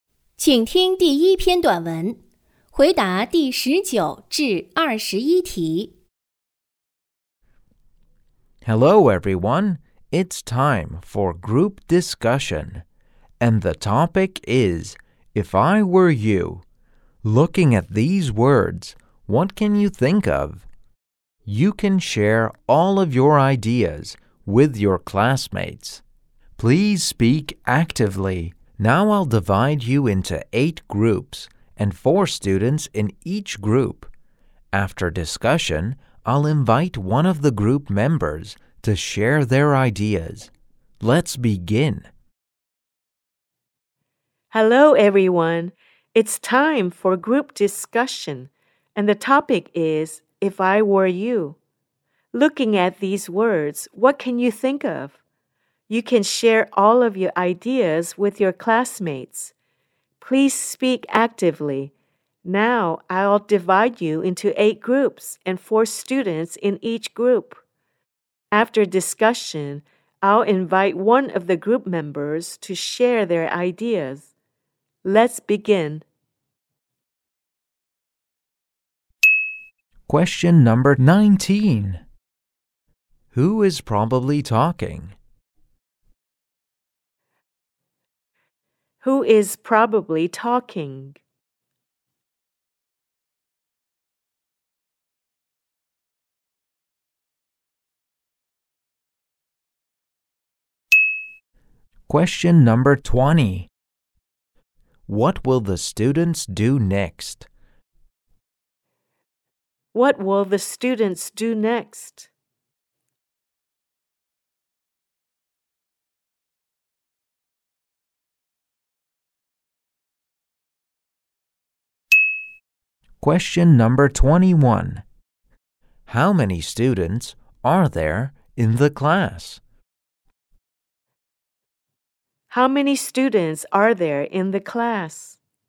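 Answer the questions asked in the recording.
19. A teacher
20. Have a group discussion
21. 32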